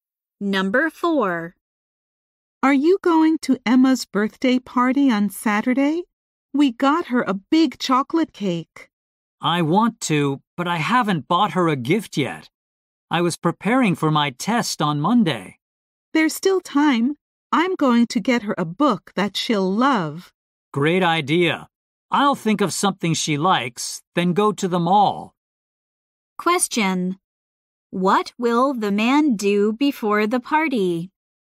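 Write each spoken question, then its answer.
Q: What will the man do before the party?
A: Go to the mall to buy Emma a gift.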